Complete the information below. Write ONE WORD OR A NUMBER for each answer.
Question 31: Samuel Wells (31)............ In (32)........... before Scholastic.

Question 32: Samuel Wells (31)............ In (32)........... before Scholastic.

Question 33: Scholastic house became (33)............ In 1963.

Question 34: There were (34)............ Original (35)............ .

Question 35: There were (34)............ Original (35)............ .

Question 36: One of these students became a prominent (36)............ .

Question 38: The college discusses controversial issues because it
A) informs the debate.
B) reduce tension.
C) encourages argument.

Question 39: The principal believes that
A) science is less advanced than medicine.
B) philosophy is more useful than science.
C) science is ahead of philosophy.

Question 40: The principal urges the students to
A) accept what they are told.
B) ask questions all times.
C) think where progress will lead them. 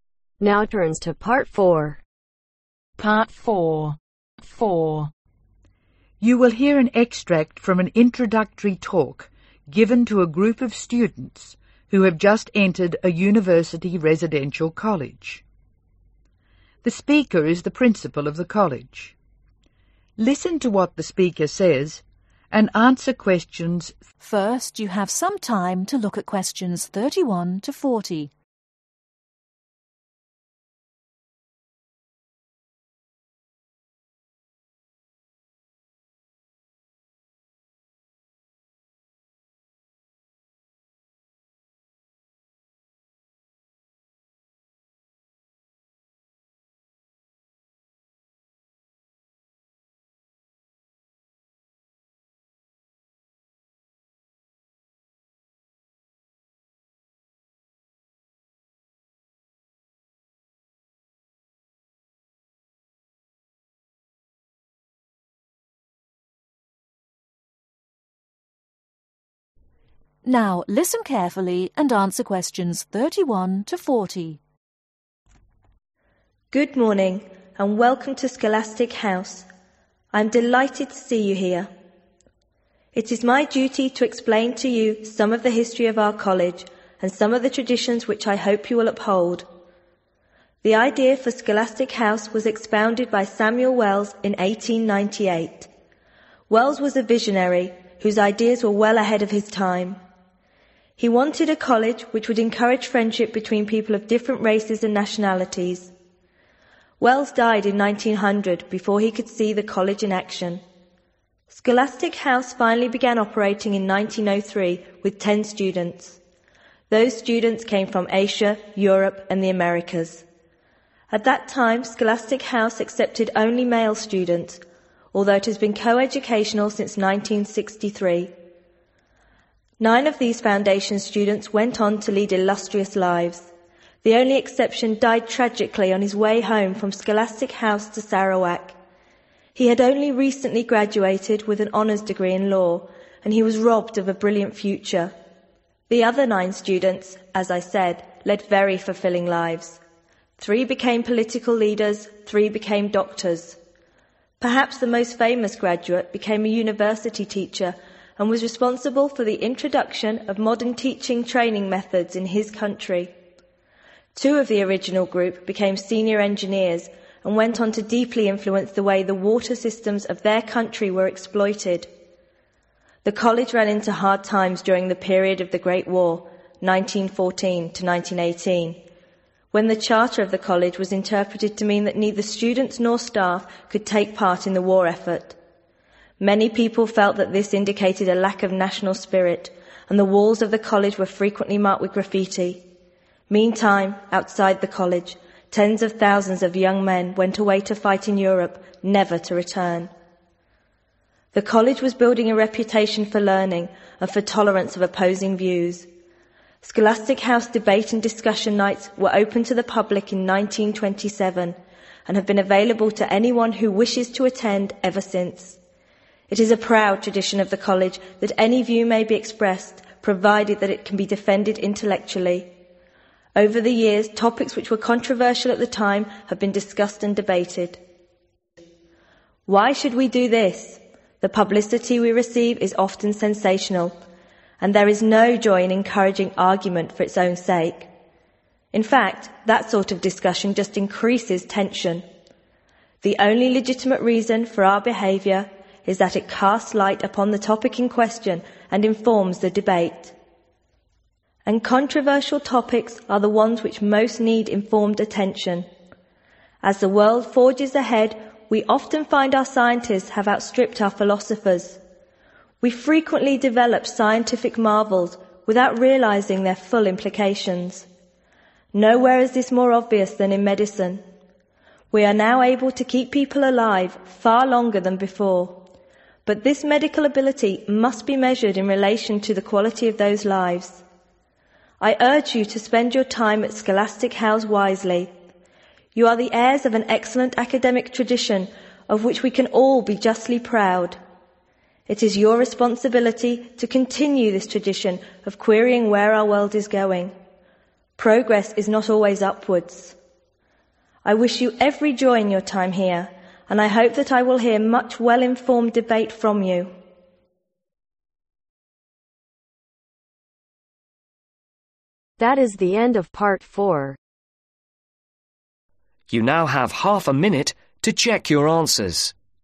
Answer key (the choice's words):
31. Died
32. 1900
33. Co-educational
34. 10
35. Students
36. Teacher
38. informs the debate.
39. science is ahead of philosophy.
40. think where progress will lead them.